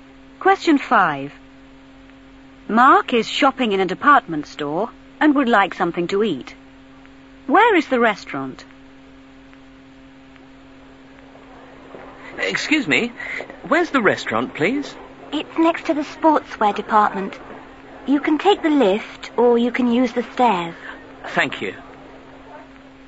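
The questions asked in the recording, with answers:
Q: Where is the restaurant?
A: Next to the sportswear department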